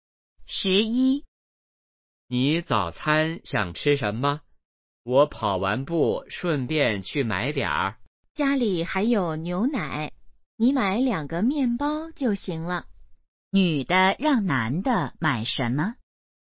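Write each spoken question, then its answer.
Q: 女的让男的买什么?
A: 面包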